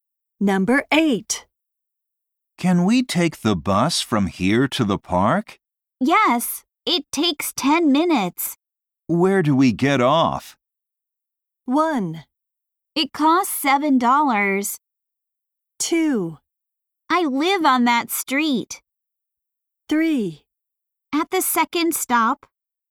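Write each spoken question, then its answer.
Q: Where do we get off?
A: 3: At the second stop.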